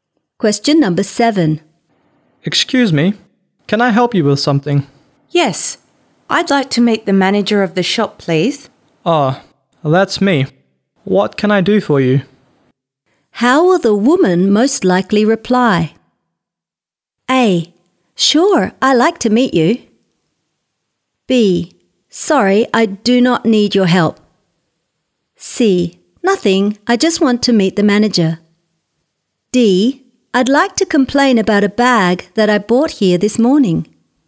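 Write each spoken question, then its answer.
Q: How will the woman most likely reply?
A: D: I'd like to complain about a bag that I bought here this morning.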